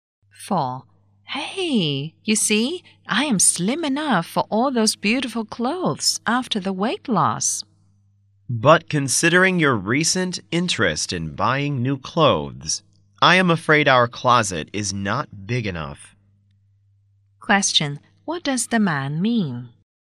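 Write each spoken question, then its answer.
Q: What does the man mean?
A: The woman is buying too many clothes for their closet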